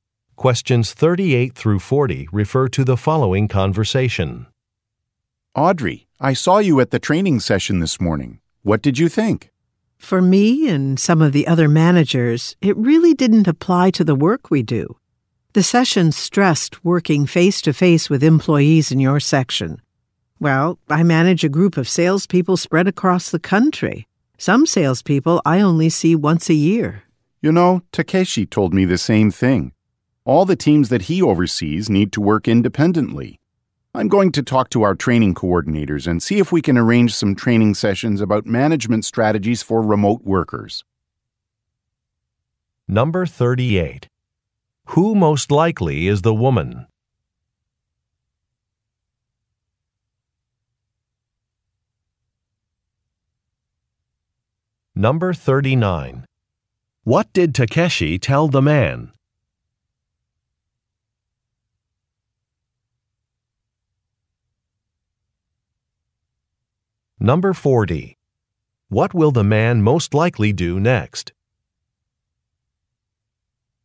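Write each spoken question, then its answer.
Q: Who most likely is the woman?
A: A sales manager

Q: What did Takeshi tell the man?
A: The training didn't apply to his work, as his teams work independently

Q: What will the man most likely do next?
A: Talk to the training coordinators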